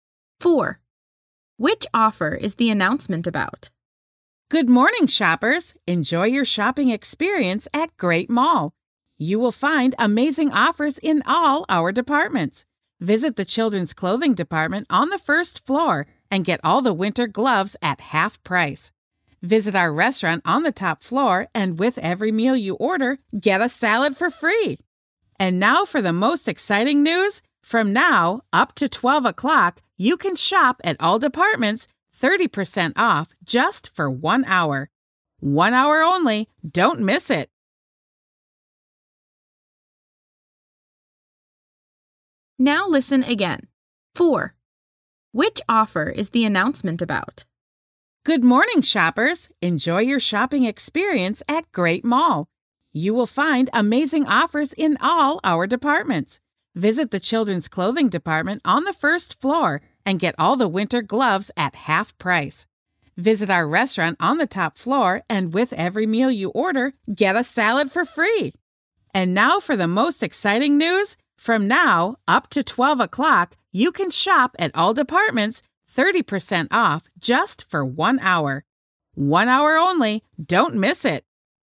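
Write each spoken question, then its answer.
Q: Which offer is the announcement about?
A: 30% off in all departments for one hour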